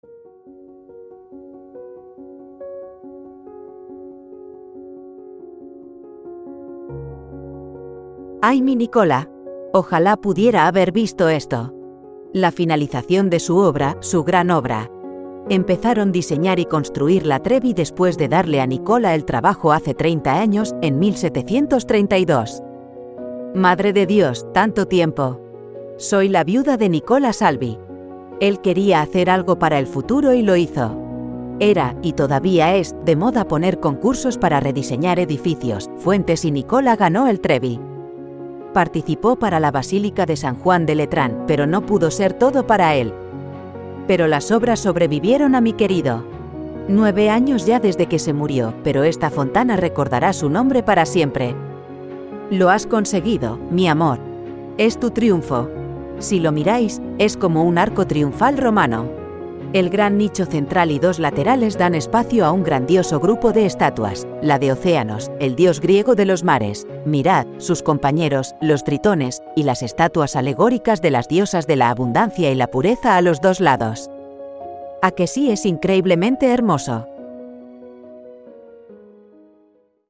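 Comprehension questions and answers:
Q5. ¿En qué siglo se diseñó y se construyó el complejo de estatuas que forman la fuente?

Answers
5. En el siglo XVIII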